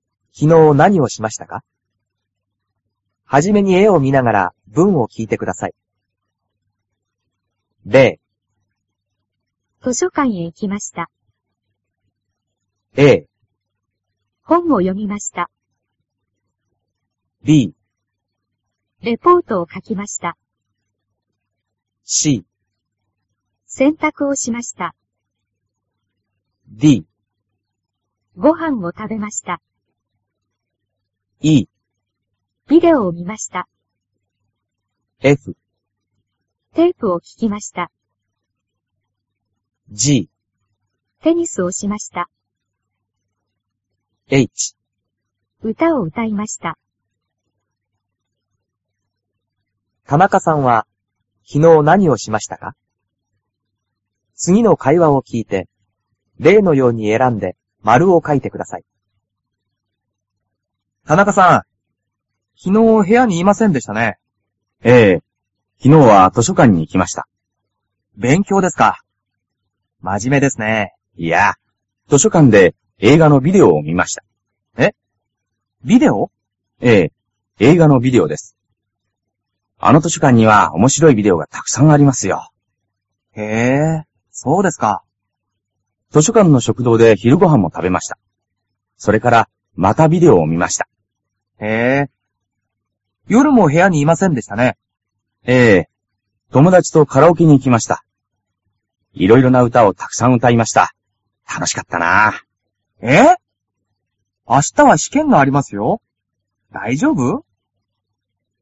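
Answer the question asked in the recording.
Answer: E: ビデオを見ました; D: ご飯を食べました; H: 歌を歌いました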